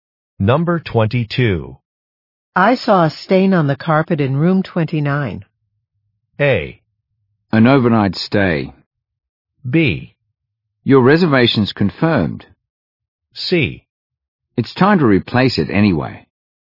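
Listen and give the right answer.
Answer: C: It's time to replace it anyway.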